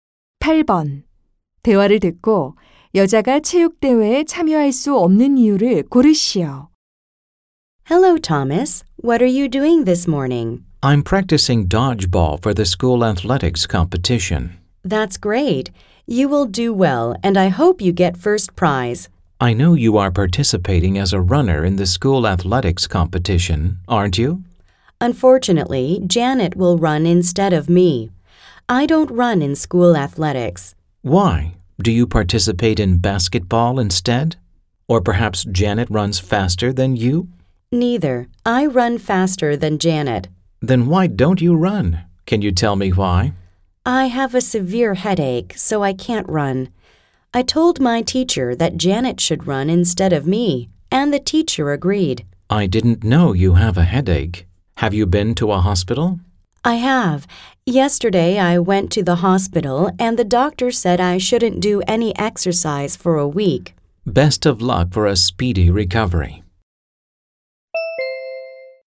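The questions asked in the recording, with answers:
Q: 대화를 듣고 여자가 체육대회에 참여할 수 없는 이유를 고르시오.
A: 심한 두통이 있어서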